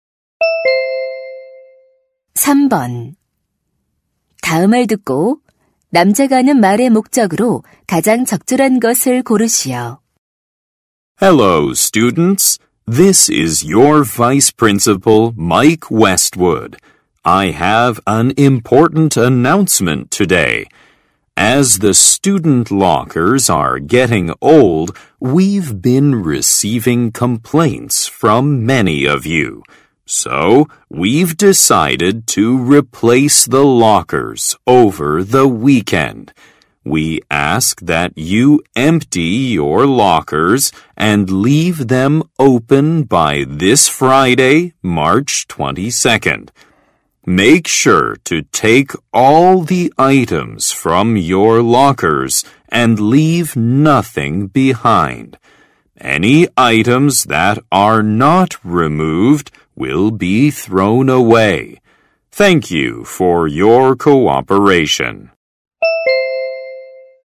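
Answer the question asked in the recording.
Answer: 사물함 교체를 위해 사물함을 비워 달라고 요청하려고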